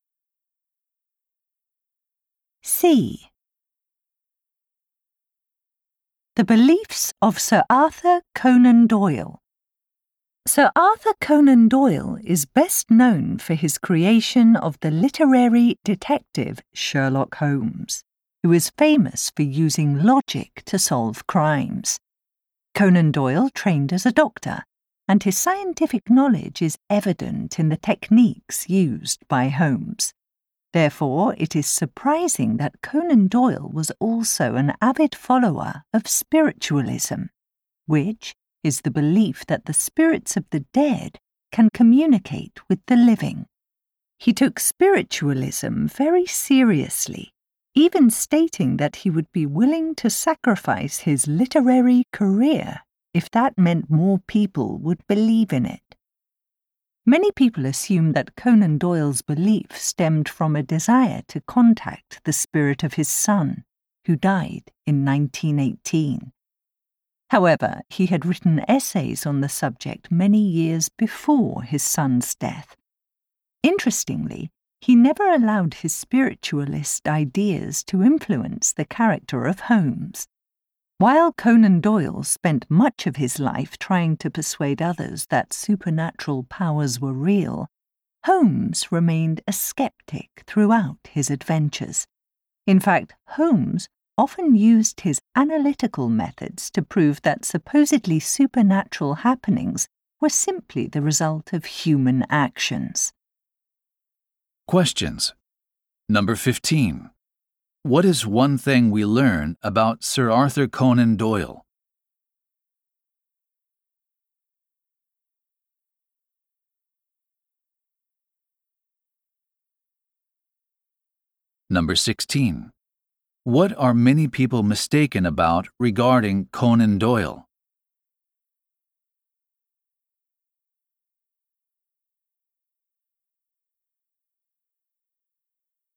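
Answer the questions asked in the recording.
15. He was a keen follower of spiritualism, even though he was a scientifically trained doctor.
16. They think his spiritualism came from wanting to contact his dead son.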